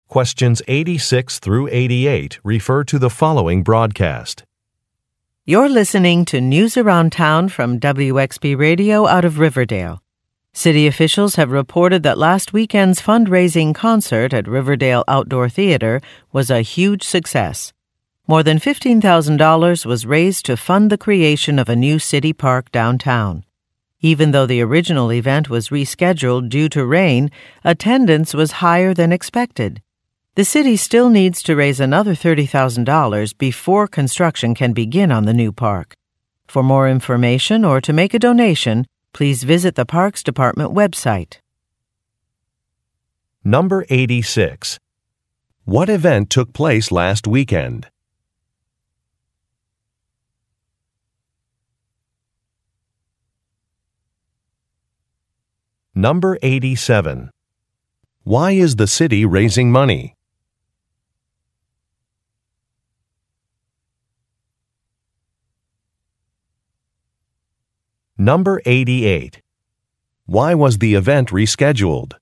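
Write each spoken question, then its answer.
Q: What event took place last weekend?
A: A fundraising concert

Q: Why is the city raising money?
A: To create a new city park downtown

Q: Why was the event rescheduled?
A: Because of rain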